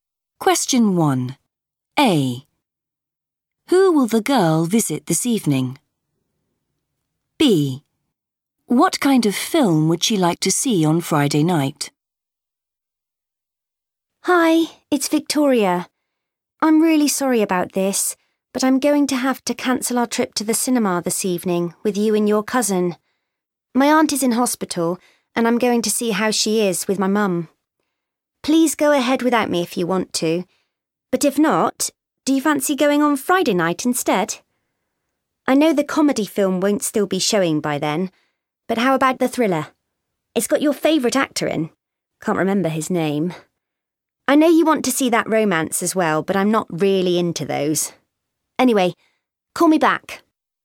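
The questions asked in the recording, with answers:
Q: Who will the girl visit this evening?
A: her aunt

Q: What kind of film would she like to see on Friday night?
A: a thriller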